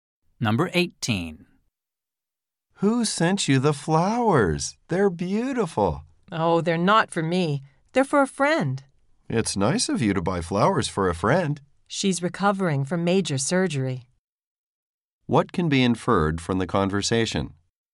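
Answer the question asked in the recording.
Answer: The flowers are for a friend recovering from surgery.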